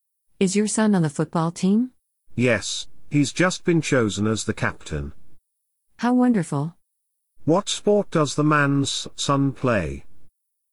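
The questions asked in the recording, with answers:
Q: What sport does the man's son play?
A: Football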